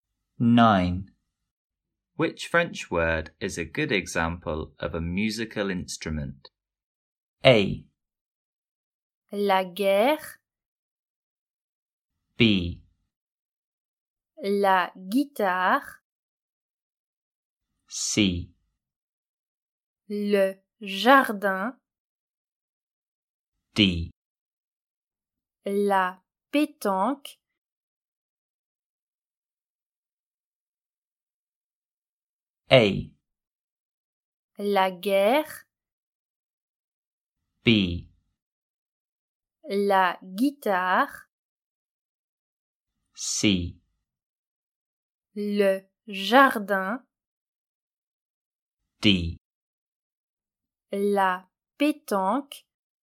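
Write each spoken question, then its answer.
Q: Which French word is a good example of a musical instrument?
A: B: La guitare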